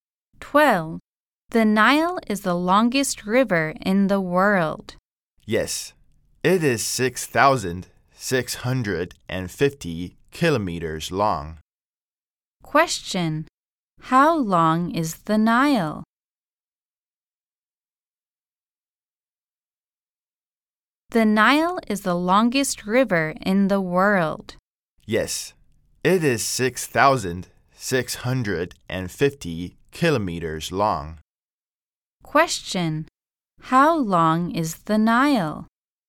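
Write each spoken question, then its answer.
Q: How long is the Nile?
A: 6,650 kilometers long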